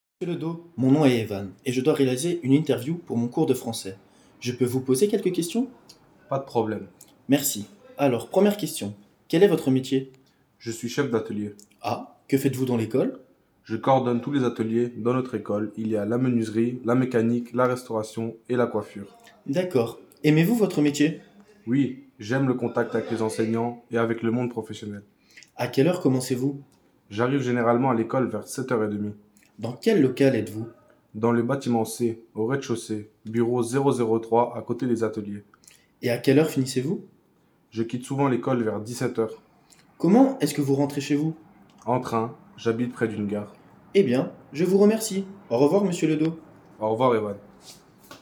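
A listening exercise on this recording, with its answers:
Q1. Qui interroge ?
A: Evan, un élève

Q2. Qui répond ?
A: Monsieur Ledo, le chef d'atelier

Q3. La personne est interrogée pour :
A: une interview pour le cours de français

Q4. Quelle activité fait la personne ?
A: Il coordonne tous les ateliers de l'école

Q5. Dans son travail, il aime ?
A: le contact avec les enseignants et le monde professionnel

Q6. Quel est son horaire ?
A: de 7h30 à 17h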